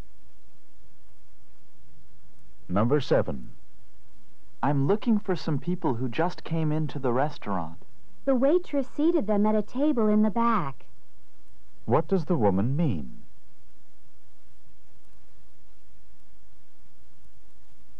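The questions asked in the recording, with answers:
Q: What does the woman mean?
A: The people are seated at a table in the back.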